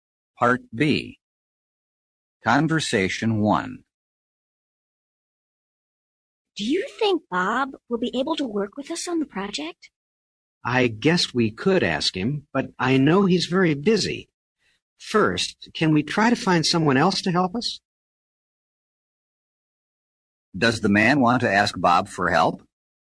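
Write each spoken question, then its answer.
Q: Does the man want to ask Bob for help?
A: No, he wants to find someone else first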